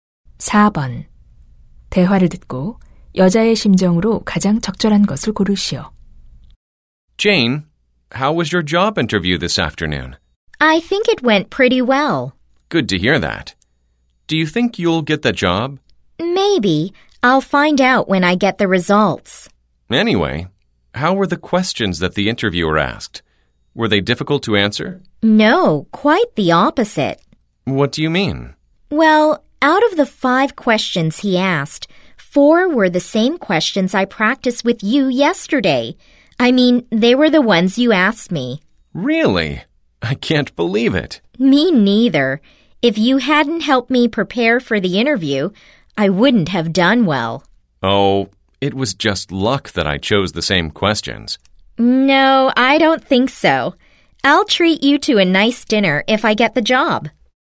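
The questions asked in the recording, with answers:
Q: 대화를 듣고 여자의 심정으로 가장 적절한 것을 고르시오.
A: 고마움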